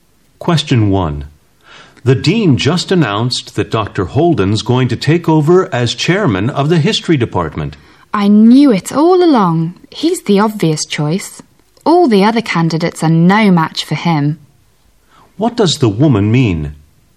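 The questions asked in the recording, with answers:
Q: What does the woman mean?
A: She expected Dr. Holden to be chosen; he was the obvious, best candidate.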